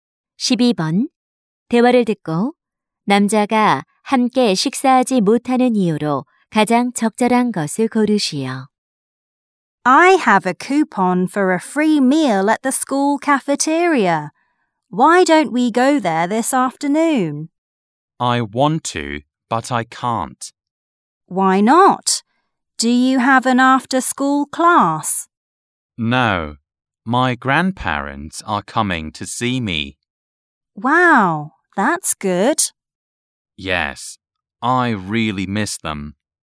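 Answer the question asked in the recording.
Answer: 조부모님이 만나러 오셔서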